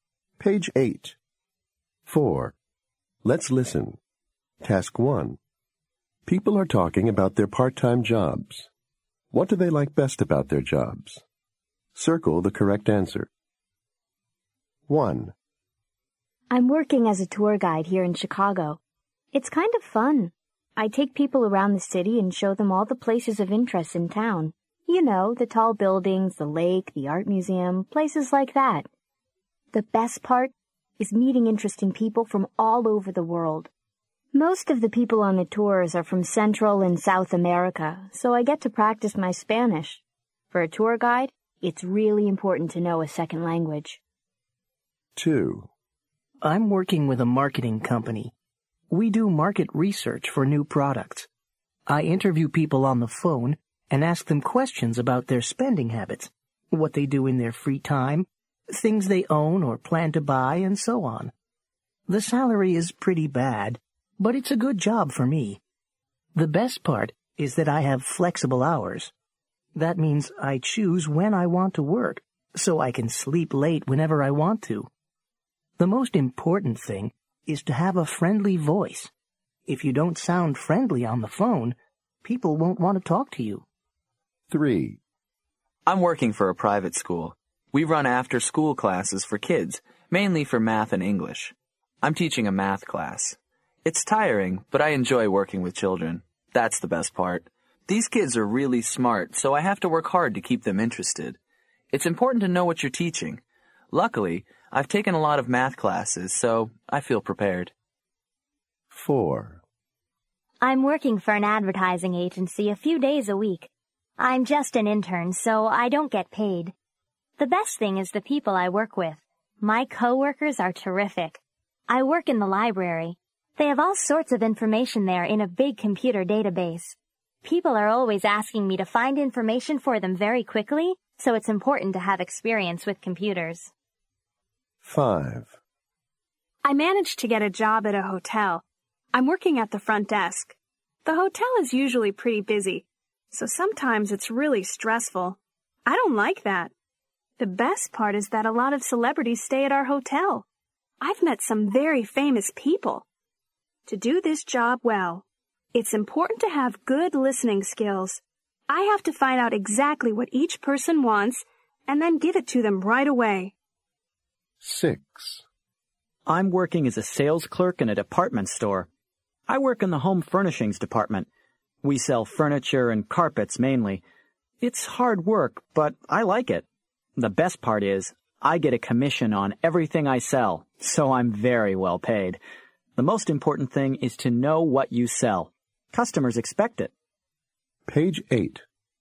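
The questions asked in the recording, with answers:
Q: What do they like best about their jobs?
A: Meeting interesting people from all over the world

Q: What do they like best about their jobs?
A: Flexible hours

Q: What do they like best about their jobs?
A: Working with children

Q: What do they like best about their jobs?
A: The people they work with

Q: What do they like best about their jobs?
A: Meeting celebrities

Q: What do they like best about their jobs?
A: Getting a commission, so well paid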